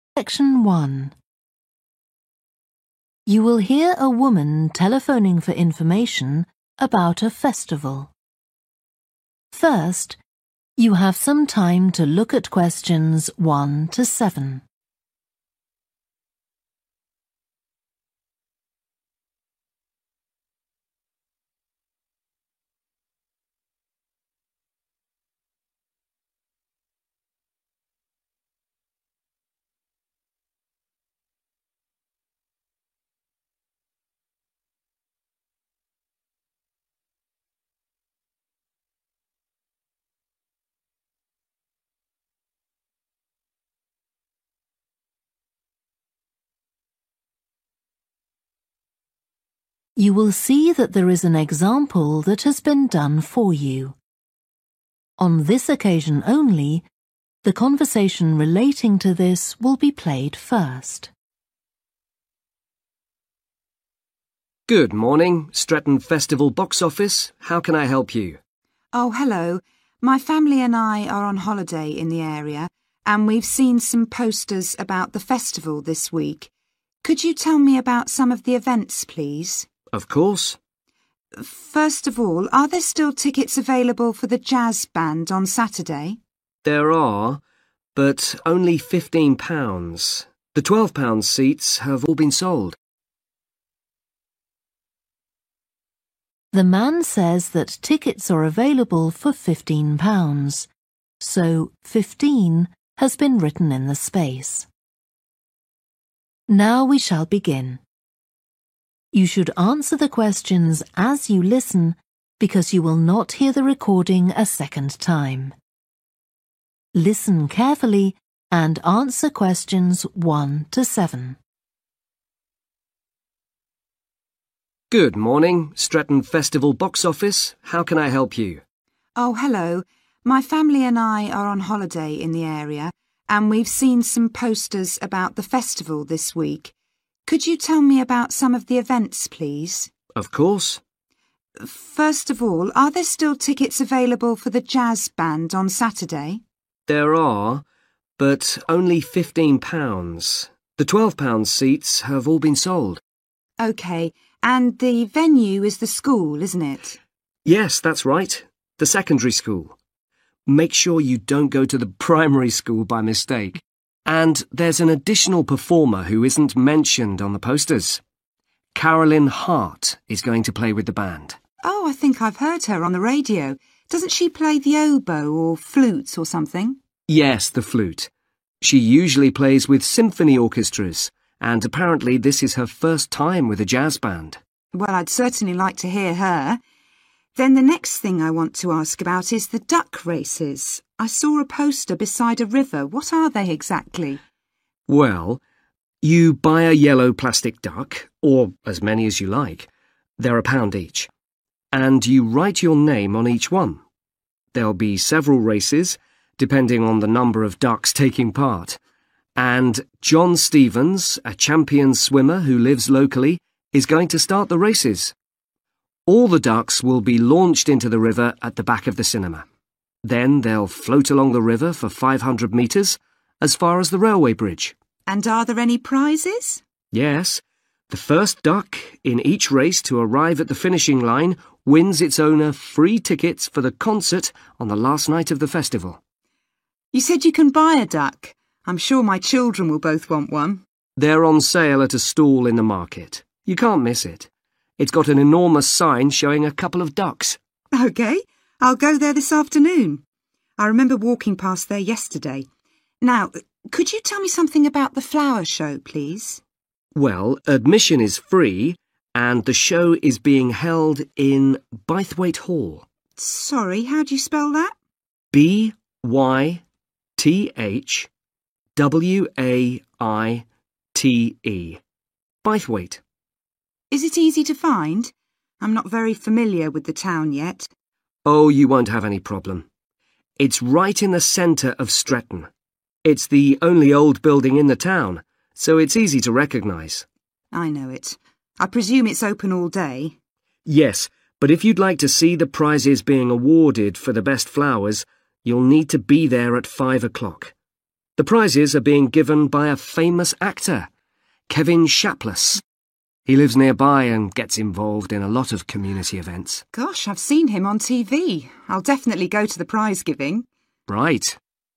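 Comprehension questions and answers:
Complete the table below. Write ONE WORD AND/OR A NUMBER for each answer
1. The school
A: secondary

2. Also appearing: Carolyn Hart (plays the )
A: flute

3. Start behind the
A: cinema

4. Prize: tickets for held at the end of the festival.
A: concert

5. Ducks can be bought in the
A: market

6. Hall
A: Bythwaite

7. Prizes presented at 5 pm by a well-known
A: actor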